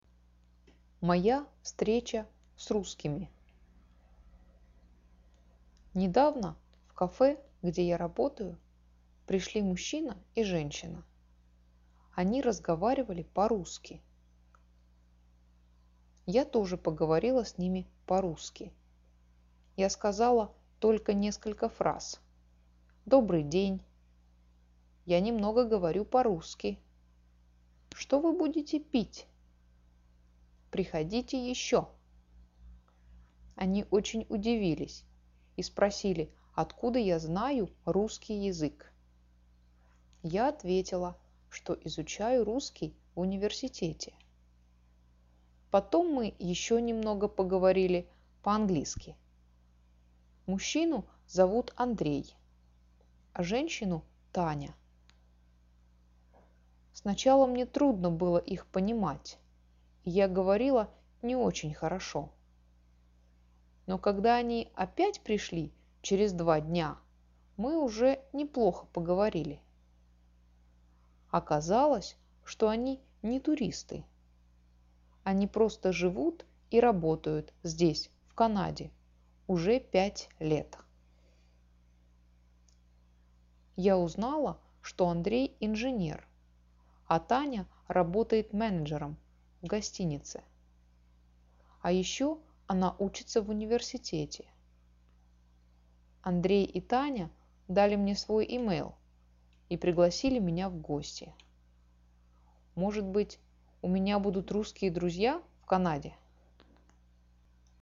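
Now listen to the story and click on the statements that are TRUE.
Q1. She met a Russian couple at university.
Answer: False

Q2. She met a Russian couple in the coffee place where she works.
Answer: True

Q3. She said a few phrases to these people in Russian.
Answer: True

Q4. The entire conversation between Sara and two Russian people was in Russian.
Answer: False

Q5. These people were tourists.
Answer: False

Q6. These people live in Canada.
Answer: True

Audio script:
Они очень удивились и спросили откуда я знаю русский язык.
Я ответила, что изучаю русский в университете.
Потом мы еще немного поговорили по-английски.
Мужчину зовут Андрей, а женщину Таня.
Сначала мне трудно было их понимать и я говорила плохо.
Но когда они опять пришли через два дня, мы уже неплохо поговорили.
Оказалось, что они не туристы.
Они просто живут и работают здесь в Канаде уже пять лет.
Я узнала, что Андрей – инженер, а Таня работает менеджером в гостинице.
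А ещё она учится в университете.
Андрей и Таня дали мне свой e-mail и пригласили меня в гости.
Может быть, у меня будут русские друзья в Канаде?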